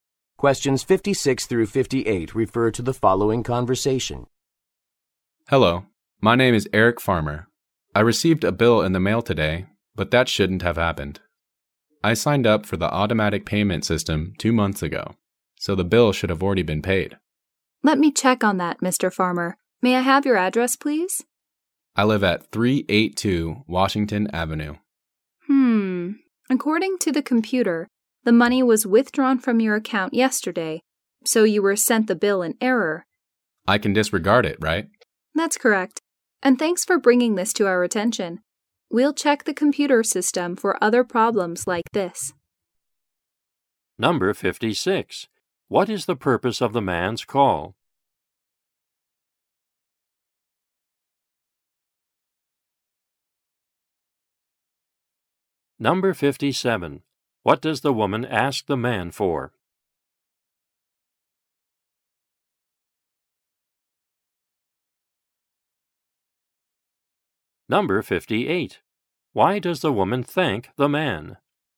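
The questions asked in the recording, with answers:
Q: What is the purpose of the man's call?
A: He received a bill that should have been paid automatically

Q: What does the woman ask the man for?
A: His address

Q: Why does the woman thank the man?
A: For bringing the problem to their attention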